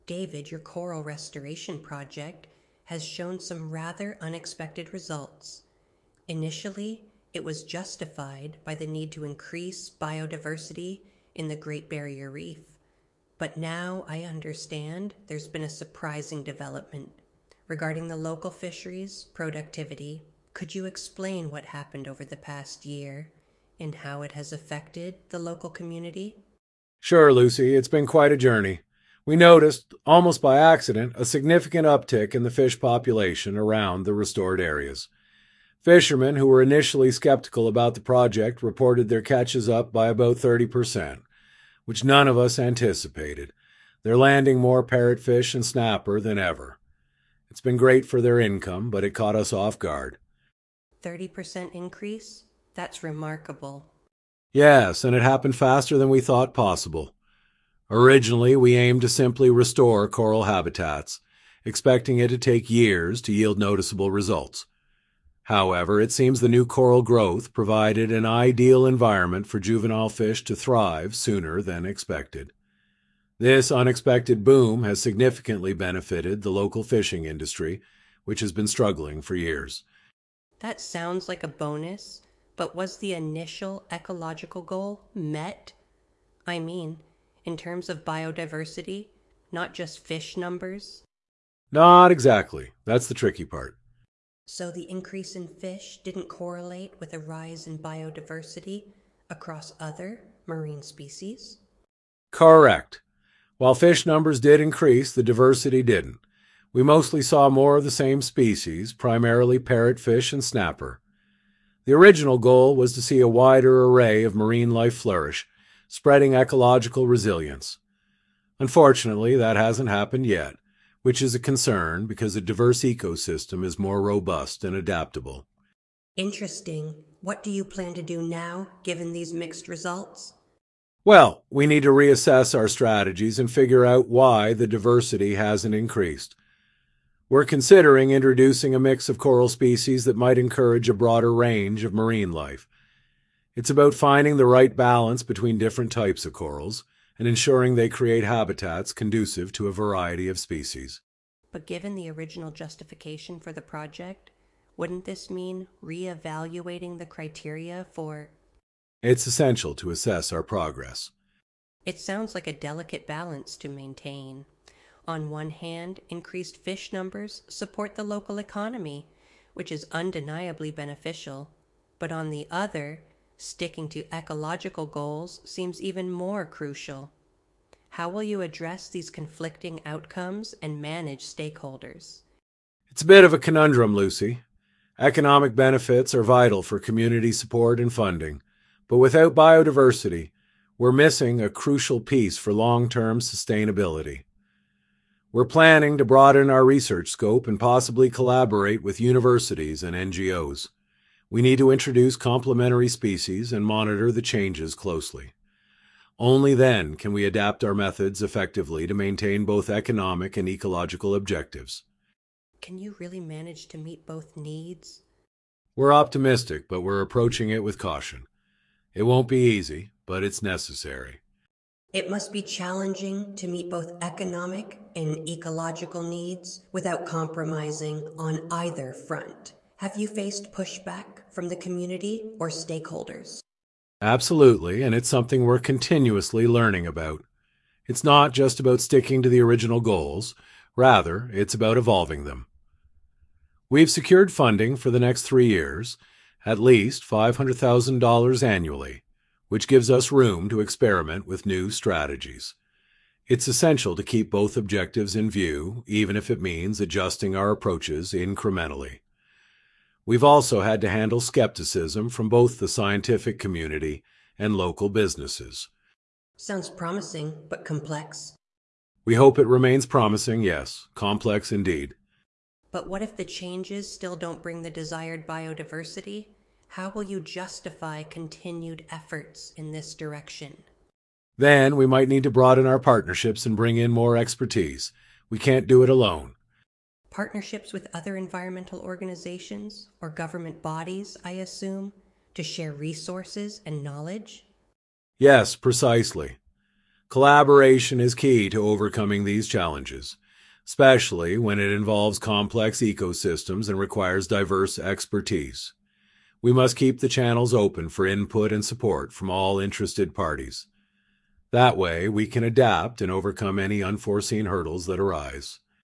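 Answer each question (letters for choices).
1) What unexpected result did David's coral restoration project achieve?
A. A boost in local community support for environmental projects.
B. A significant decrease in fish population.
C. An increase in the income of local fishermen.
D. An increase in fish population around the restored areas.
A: D

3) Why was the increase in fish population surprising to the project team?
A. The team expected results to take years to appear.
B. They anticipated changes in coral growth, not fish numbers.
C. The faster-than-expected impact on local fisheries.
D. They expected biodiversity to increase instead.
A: A

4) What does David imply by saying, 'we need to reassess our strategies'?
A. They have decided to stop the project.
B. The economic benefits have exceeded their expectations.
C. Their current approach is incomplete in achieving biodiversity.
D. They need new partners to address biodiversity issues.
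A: C

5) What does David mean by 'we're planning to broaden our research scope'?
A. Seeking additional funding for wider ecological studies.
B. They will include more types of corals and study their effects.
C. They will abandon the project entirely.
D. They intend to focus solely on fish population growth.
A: B

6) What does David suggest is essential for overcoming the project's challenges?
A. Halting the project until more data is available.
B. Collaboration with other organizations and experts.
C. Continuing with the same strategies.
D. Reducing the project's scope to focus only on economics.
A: B

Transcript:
Lucy: David, your coral restoration project has shown some rather unexpected results. Initially, it was justified by the need to increase biodiversity in the Great Barrier Reef, but now I understand there's been a surprising development regarding the local fisheries' productivity. 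Could you explain what happened over the past year and how it has affected the local community?
David: Sure, Lucy. It's been quite a journey. We noticed, almost by accident, a significant uptick in the fish population around the restored areas. Fishermen who were initially sceptical about the project reported their catches up by about 30%, which none of us anticipated. They're landing more parrotfish and snapper than ever. It's been great for their income, but it caught us off guard.
Lucy: Thirty percent increase? That's remarkable.
David: Yes, and it happened faster than we thought possible. Originally, we aimed to simply restore coral habitats, expecting it to take years to yield noticeable results. However, it seems the new coral growth provided an ideal environment for juvenile fish to thrive sooner than expected. This unexpected boom has significantly benefitted the local fishing industry, which has been struggling for years.
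Lucy: That sounds like a bonus, but was the initial ecological goal met? I mean, in terms of biodiversity, not just fish numbers?
David: Not exactly. That's the tricky part.
Lucy: So, the increase in fish didn't correlate with a rise in biodiversity across other marine species?
David: Correct. While fish numbers did increase, the diversity didn't. We mostly saw more of the same species, primarily parrotfish and snapper. The original goal was to see a wider array of marine life flourish, spreading ecological resilience. Unfortunately, that hasn't happened yet, which is a concern because a diverse ecosystem is more robust and adaptable.
Lucy: Interesting. What do you plan to do now, given these mixed results?
David: Well, we need to reassess our strategies and figure out why the diversity hasn't increased. We're considering introducing a mix of coral species that might encourage a broader range of marine life. 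It's about finding the right balance between different types of corals and ensuring they create habitats conducive to a variety of species.
Lucy: But given the original justification for the project, wouldn't this mean reevaluating the criteria for—
David: It's essential to assess our progress.
Lucy: It sounds like a delicate balance to maintain. On one hand, increased fish numbers support the local economy, which is undeniably beneficial. But on the other, sticking to ecological goals seems even more crucial. How will you address these conflicting outcomes and manage stakeholders?
David: It's a bit of a conundrum, Lucy. Economic benefits are vital for community support and funding, but without biodiversity, we're missing a crucial piece for long-term sustainability. We're planning to broaden our research scope and possibly collaborate with universities and NGOs. We need to introduce complementary species and monitor the changes closely. 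Only then can we adapt our methods effectively to maintain both economic and ecological objectives.
Lucy: Can you really manage to meet both needs?
David: We're optimistic, but we're approaching it with caution. It won't be easy, but it's necessary.
Lucy: It must be challenging to meet both economic and ecological needs without compromising on either front. Have you faced pushback from the community or stakeholders?
David: Absolutely, and it's something we're continuously learning about. It's not just about sticking to the original goals; rather, it's about evolving them. We've secured funding for the next three years, at least $500,000 annually, which gives us room to experiment with new strategies. It's essential to keep both objectives in view, even if it means adjusting our approaches incrementally. We've also had to handle skepticism from both the scientific community and local businesses.
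Lucy: Sounds promising, but complex.
David: We hope it remains promising, yes. Complex, indeed.
Lucy: But what if the changes still don't bring the desired biodiversity? How will you justify continued efforts in this direction?
David: Then we might need to broaden our partnerships and bring in more expertise. We can't do it alone.
Lucy: Partnerships with other environmental organizations or government bodies, I assume? To share resources and knowledge?
David: Yes, precisely. Collaboration is key to overcoming these challenges, especially when it involves complex ecosystems and requires diverse expertise. We must keep the channels open for input and support from all interested parties.

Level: C1 Advanced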